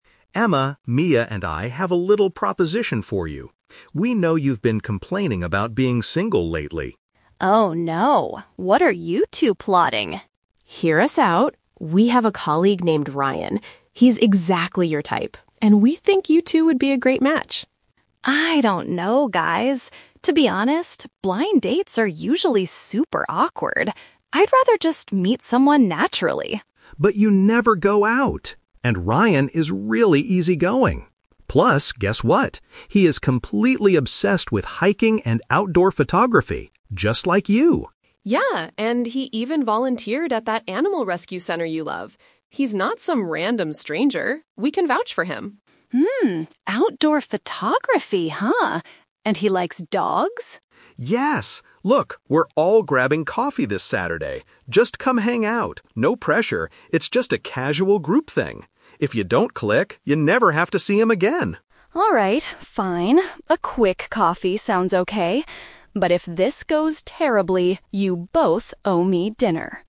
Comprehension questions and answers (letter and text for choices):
Listen to three friends talking about setting up a date. Choose the best answer (A, B, or C) for each question.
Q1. Why is Emma hesitant about the proposal at first?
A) She recently had a bad experience with a colleague.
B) She thinks set-ups by friends are often uncomfortable.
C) She doesn't have time because of her volunteer work.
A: B) She thinks set-ups by friends are often uncomfortable.

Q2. What do Emma and Ryan have in common?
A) They both work in the same office.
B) They enjoy taking pictures in nature.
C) They are both looking for a serious relationship.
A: B) They enjoy taking pictures in nature.

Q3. What is the final plan for the weekend?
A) Emma and Ryan will go on a hike together.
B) Jake and Mia will treat Emma to a nice dinner.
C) The friends will meet for a relaxed group beverage.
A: C) The friends will meet for a relaxed group beverage.

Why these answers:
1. Emma says that "blind dates are usually super awkward." In this context, a blind date organized by friends is a "set-up," and "uncomfortable" is a synonym for "awkward."
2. Jake mentions that Ryan is obsessed with "outdoor photography, just like you." Taking pictures in nature is a paraphrase of outdoor photography.
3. Jake suggests "grabbing coffee" and calls it a "casual group thing." A relaxed group beverage perfectly paraphrases this idea.

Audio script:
Jake: Emma, Mia and I have a little proposition for you. We know you've been complaining about being single lately.
Emma: Oh no, what are you two plotting?
Mia: Hear us out! We have a colleague named Ryan. He's exactly your type, and we think you two would be a great match.
Emma: I don't know, guys. To be honest, blind dates are usually super awkward. I'd rather just meet someone naturally.
Jake: But you never go out! And Ryan is really easygoing. Plus, guess what? He is completely obsessed with hiking and outdoor photography, just like you.
Mia: Yeah, and he even volunteered at that animal rescue center you love. He's not some random stranger; we can vouch for him.
Emma: Hmm, outdoor photography, huh? And he likes dogs?
Jake: Yes! Look, we're all grabbing coffee this Saturday. Just come hang out. No pressure, it's just a casual group thing. If you don't click, you never have to see him again.
A quick coffee sounds okay. But if this goes terribly, you both owe me dinner!